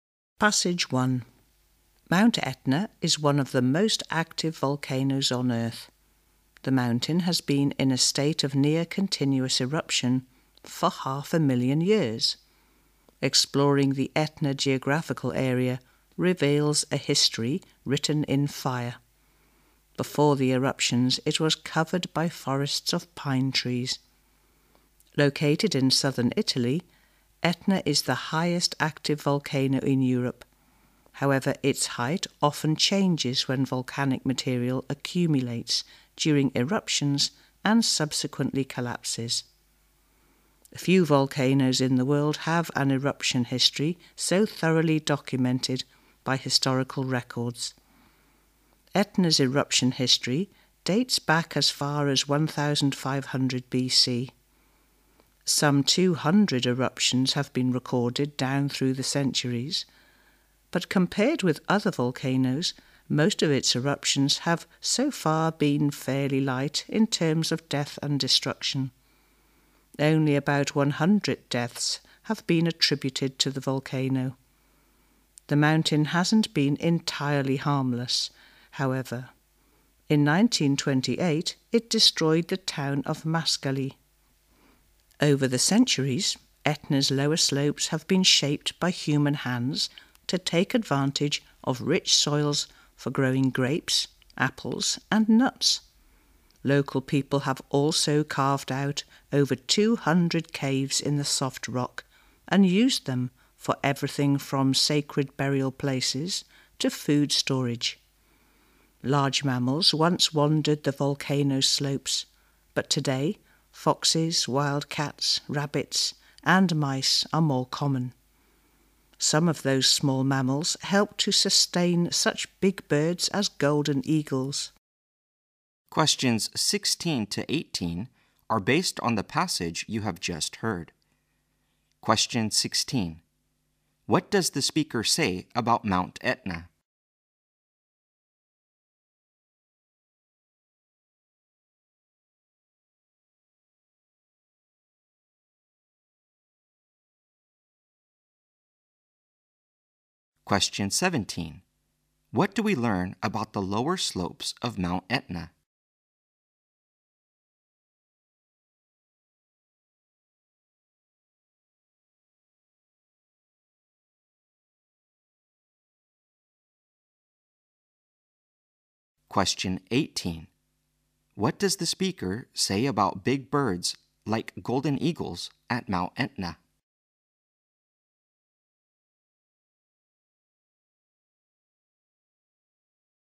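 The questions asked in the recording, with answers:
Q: What do we learn about the lower slopes of Mount Etna?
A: They have been shaped by people to use the rich soils for growing grapes, apples and nuts

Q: What does the speaker say about big birds like golden eagles at Mount Etna?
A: They are sustained by small mammals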